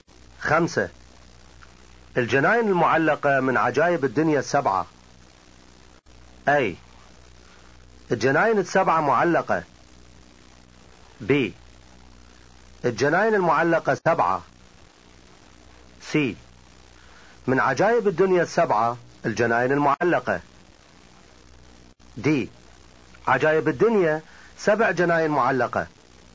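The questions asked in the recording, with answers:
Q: الجناين المعلقة من عجائب الدنيا السبعة.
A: C: من عجائب الدنيا السبعة الجناين المعلقة.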